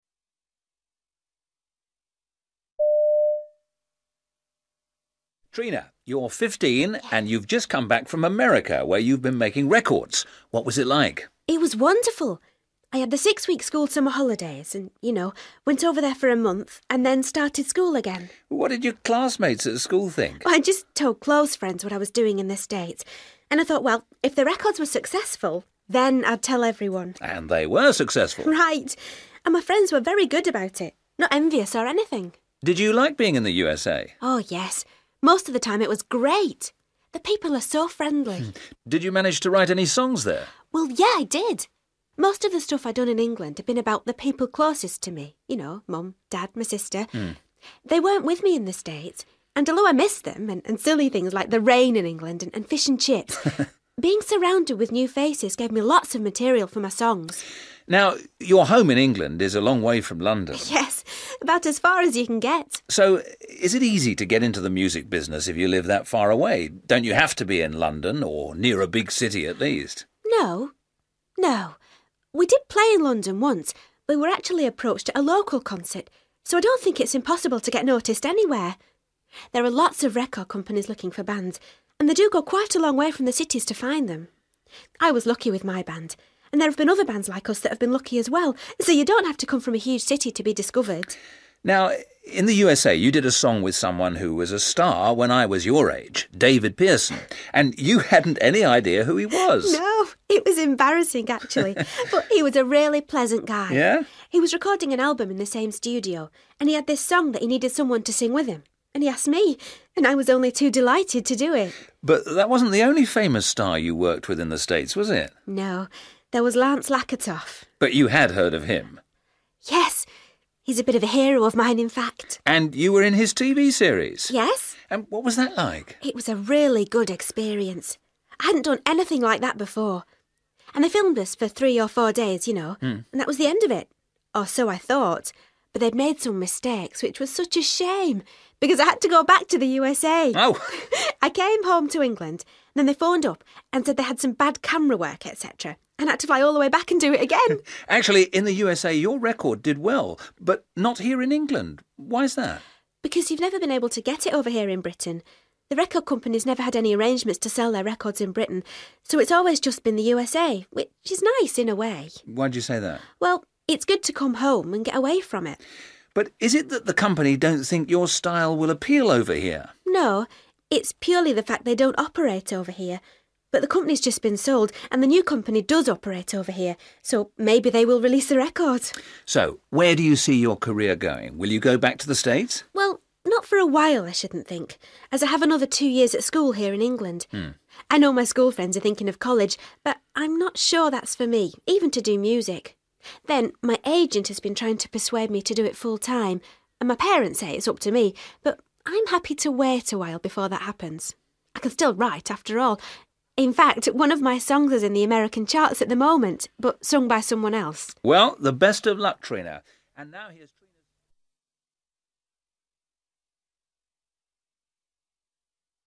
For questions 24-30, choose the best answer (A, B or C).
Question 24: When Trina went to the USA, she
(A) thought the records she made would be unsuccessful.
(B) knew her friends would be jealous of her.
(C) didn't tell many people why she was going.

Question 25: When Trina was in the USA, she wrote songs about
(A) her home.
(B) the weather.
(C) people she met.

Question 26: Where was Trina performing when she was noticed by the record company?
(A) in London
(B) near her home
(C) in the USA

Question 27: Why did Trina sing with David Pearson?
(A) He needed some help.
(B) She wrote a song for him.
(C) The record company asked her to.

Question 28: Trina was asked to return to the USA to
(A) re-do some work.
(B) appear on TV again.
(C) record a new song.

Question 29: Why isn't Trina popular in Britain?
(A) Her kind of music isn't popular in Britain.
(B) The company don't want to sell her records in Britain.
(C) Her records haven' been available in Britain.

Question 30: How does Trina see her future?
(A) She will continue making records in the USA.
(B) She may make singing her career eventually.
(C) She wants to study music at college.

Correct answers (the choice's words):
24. didn't tell many people why she was going.
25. people she met.
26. near her home
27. He needed some help.
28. re-do some work.
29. Her records haven' been available in Britain.
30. She may make singing her career eventually.

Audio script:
Trina, you're 15 and you've just come back from America where you've been making records. What was it like?
Trina: It was wonderful. I had the six-week school summer holidays and, you know, went over there for a month and then started school again.
Interviewer: What did your classmates at school think?
Trina: I just told close friends what I was doing in the States ... And I thought, well, if the records were successful, then I'd tell everyone ...
Interviewer: And they were successful.
Trina: Right. And my friends were very good about it. Not envious, or anything.
Interviewer: Did you like being in the USA?
Trina: Oh, yes, most of the time it was great – the people are so friendly.
Interviewer: Did you manage to write any songs there?
Trina: Well, yeah, I did. Most of the stuff I'd done in England had been about the people closest to me – you know, Mum, Dad, my sister. They weren't with me in the States, and although I missed them and silly things like the rain in England and fish and chips, being surrounded with new faces gave me lots of material for my songs.
Interviewer: Now, your home in England is a long way from London.
Trina: Yes, about as far as you can get!
Interviewer: So, is it easy to get into the music business if you live that far away? Don't you have to be in London or near a big city at least?
Trina: No, no. We did play in London once but we were actually approached at a local concert, so I don't think it's impossible to get noticed anywhere. There are lots of record companies looking for bands, and they do go quite a long way from the cities to find them. I was lucky with my band, and there have been other bands like us that've been lucky as well, so you don't have to come from a huge city to be discovered.
Interviewer: Now, in the USA you did a song with someone who was a star when I was your age, David Pearson, and you hadn't any idea who he was?
Trina: No. It was embarrassing, actually. But he was a really pleasant guy. He was recording an album in the same studio, and he had this song that he needed someone to sing with him, and he asked me, and I was only too delighted to do it!
Interviewer: But that wasn't the only famous star you worked with in the States, was it?
Trina: No, there was Lance Lakatoff.
Interviewer: But you had heard of him ...
Trina: Yes. He's a bit of a hero of mine, in fact.
Interviewer: And you were in his TV series?
Trina: Yes.
Interviewer: And what was that like?
Trina: It was a really good experience. I hadn't done anything like that before. And they filmed us for three or four days, you know. That was the end of it. Or so I thought! But they had made some mistakes, which was such a shame. Because I had to go back to the USA! I came home to England, and then they phoned up and said they had some bad camera work, etc., and I had to fly all the way back and do it again ...
Interviewer: Actually, in the USA your record did well. But not here in England.
Trina: Because you've never been able to get it over here in Britain. The record company's never had any arrangements to sell their records in Britain, so it's always just been the USA, which is nice in a way.
Interviewer: Why do you say that?
Trina: Well, it's good to come home and get away from it.
Interviewer: But is it that the company don't think your style will appeal over here?
Trina: No, it's purely the fact they don't operate over here. But the company's just been sold, and the new company does operate over here, so maybe they will release the record.
Interviewer: So, where do you see your career going? Will you go back to the States?
Trina: Well, not for a while I shouldn't think, as I have another two years at school here in England. I know my schoolfriends are thinking of college but I'm not sure that's for me, even to do music. Then, my agent has been trying to persuade me to do it full time, and my parents say it's up to me, but I'm happy to wait a while before that happens. I can still write, after all – in fact, one of my songs is in the American charts at the moment, but sung by someone else.
Interviewer: Well, the best of luck, Trina, and now ...